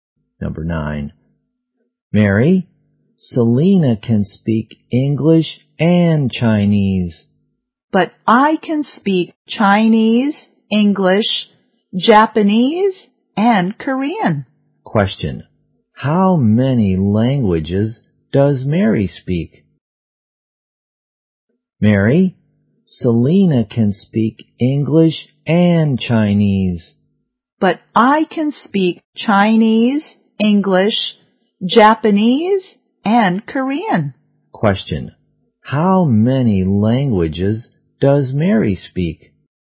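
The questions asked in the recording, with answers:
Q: How many languages does Mary speak?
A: Four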